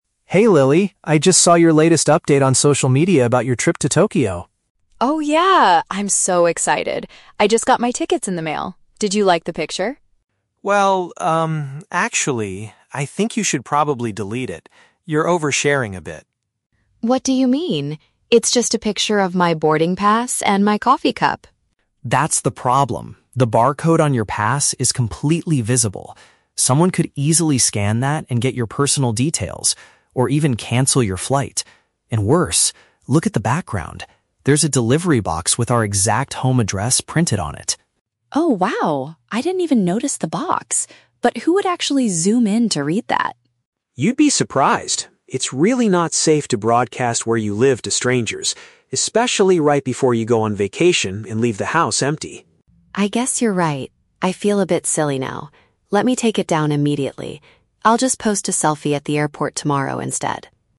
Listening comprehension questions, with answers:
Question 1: Why does Tom suggest that Lily remove her recent post?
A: She accidentally revealed private information to the public.

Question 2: According to Tom, what is the risk of showing the boarding pass online?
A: Strangers might use the code to ruin her travel plans.

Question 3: How does Lily feel after hearing her brother's explanation?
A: She feels slightly embarrassed and decides to remove the image.

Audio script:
Tom: Hey Lily, I just saw your latest update on social media about your trip to Tokyo.
Lily: Oh, yeah! I'm so excited. I just got my tickets in the mail. Did you like the picture?
Tom: Well, um, actually... I think you should probably delete it. You're oversharing a bit.
Lily: What do you mean? It's just a picture of my boarding pass and my coffee cup.
Tom: That's the problem. The barcode on your pass is completely visible. Someone could easily scan that and get your personal details, or even cancel your flight. And worse, look at the background. There's a delivery box with our exact home address printed on it.
Lily: Oh, wow. I didn't even notice the box. But who would actually zoom in to read that?
Tom: You'd be surprised. It's really not safe to broadcast where you live to strangers, especially right before you go on vacation and leave the house empty.
Lily: I guess you're right. I feel a bit silly now. Let me take it down immediately. I'll just post a selfie at the airport tomorrow instead.